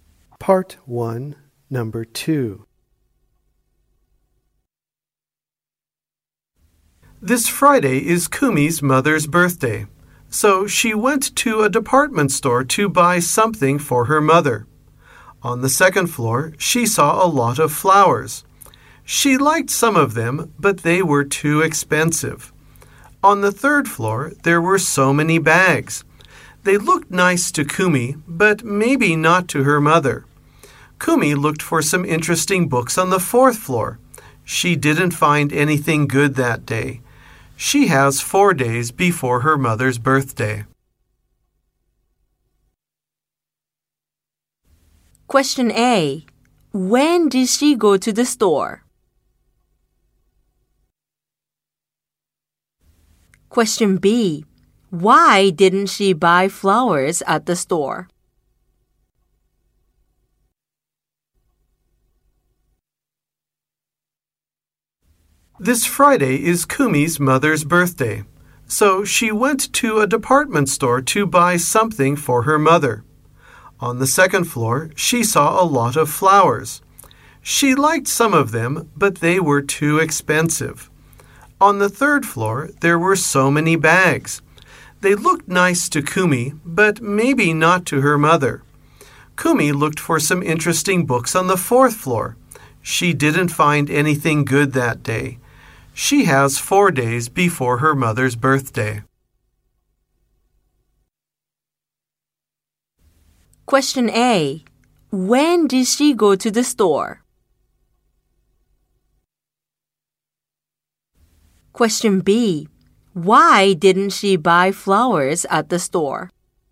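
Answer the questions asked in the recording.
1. On Monday (four days before Friday).
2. Because they were too expensive.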